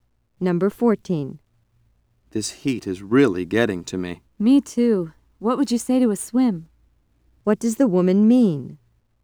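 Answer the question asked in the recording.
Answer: She suggests going for a swim.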